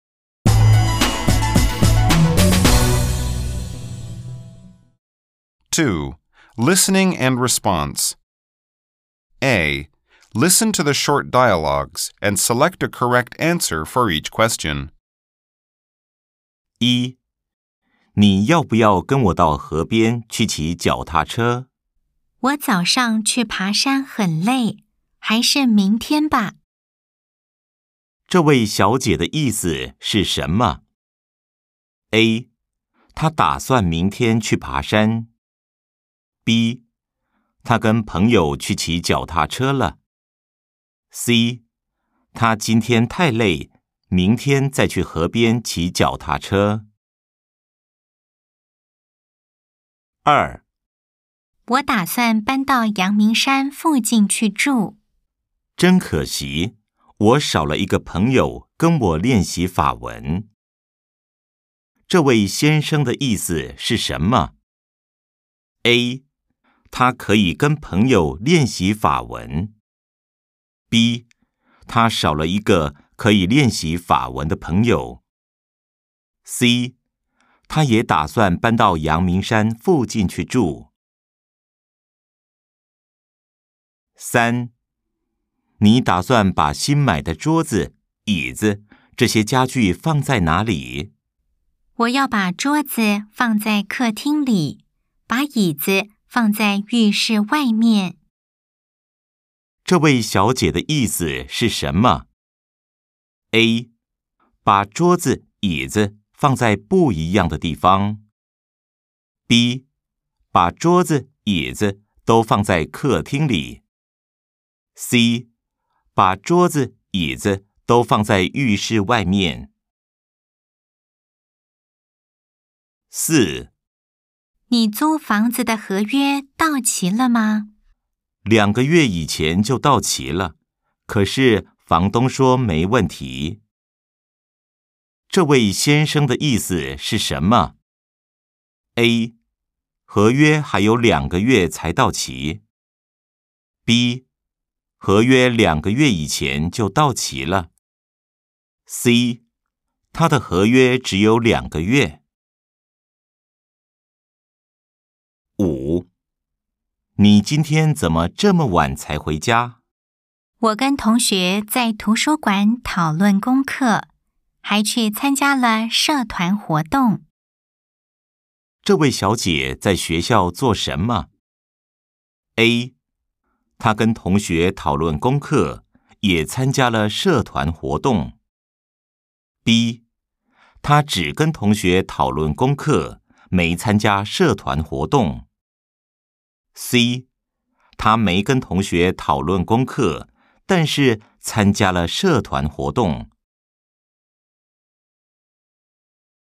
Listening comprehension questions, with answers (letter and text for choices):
Nghe những gì được nói về cô Trần và chọn câu trả lời chính xác những câu hỏi dưới đây.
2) 這位先生的意思是什麼?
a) 他可以跟朋友練習法文。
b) 他少了一個可以練習法文的朋友。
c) 他也打算搬到陽明山附近去住。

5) 這位小姐在學校做什麼?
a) 她跟同學討論功課,也參加了社團活動。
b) 她只跟同學討論功課,沒參加社團活動。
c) 她沒跟同學討論功課,但是參加了社團活動。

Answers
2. b) 他少了一個可以練習法文的朋友。
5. a) 她跟同學討論功課,也參加了社團活動。